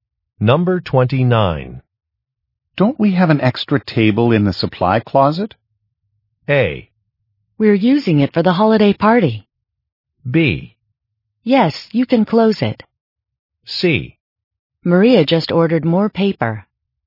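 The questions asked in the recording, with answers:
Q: Don't we have an extra table in the supply closet?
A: A: We're using it for the holiday party.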